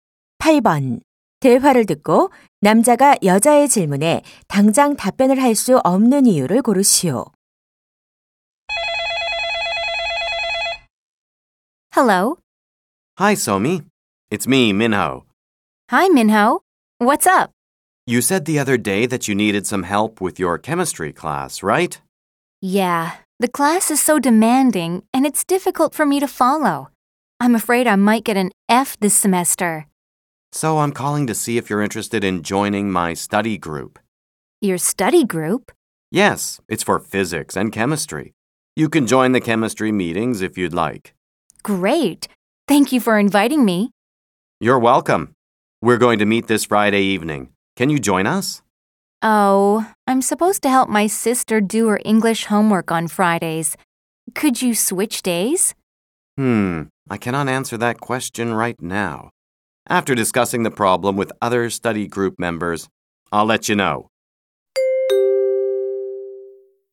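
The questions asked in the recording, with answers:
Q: 대화를 듣고 남자가 여자의 질문에 당장 답변을 할 수 없는 이유를 고르시오.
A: 다른 스터디 그룹 회원들과 먼저 상의해야 해서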